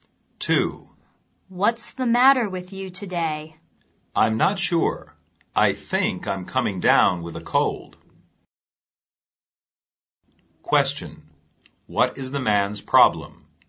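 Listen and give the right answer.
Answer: He thinks he is coming down with a cold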